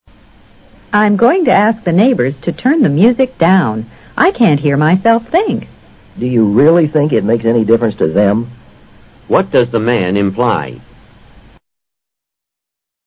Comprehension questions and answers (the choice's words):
What does the man imply?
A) She should mo9ve to another place.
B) The neighbors probably won't turn down the music.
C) He wants to listen to different music.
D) He doesn't think the music is particularly loud.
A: The neighbors probably won't turn down the music.

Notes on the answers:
make difference to: 对...有影响。这里指你过去让他们把音量放低一些,他们会照你的话做吗?显然他怀疑邻居们会放低一些。I can't hear myself think 意思是音量太大,吵得人什么也听不见。imply: 含意。